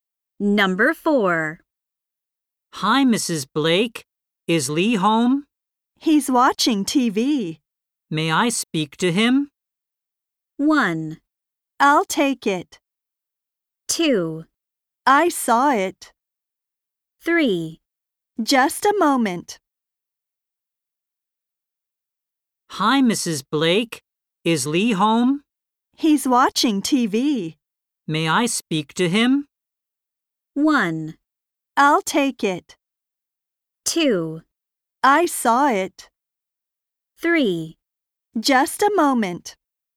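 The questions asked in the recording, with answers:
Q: May I speak to him?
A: 3: Just a moment.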